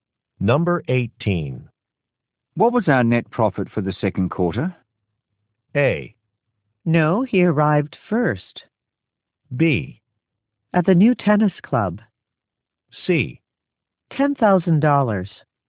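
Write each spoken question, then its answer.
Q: What was our net profit for the second quarter?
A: C: $10,000.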